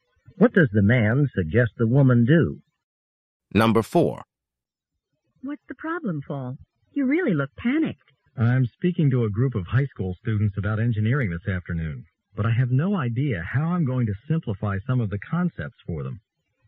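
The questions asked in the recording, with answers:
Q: What can be inferred about the man?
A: He's worried about explaining engineering concepts simply to high school students.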